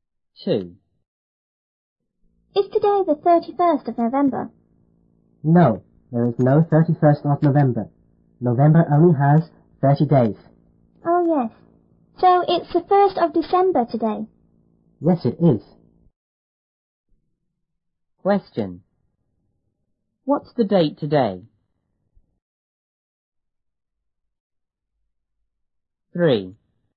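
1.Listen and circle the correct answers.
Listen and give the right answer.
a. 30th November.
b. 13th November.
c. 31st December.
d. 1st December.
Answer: d. 1st December.

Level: 初中英语广州版1B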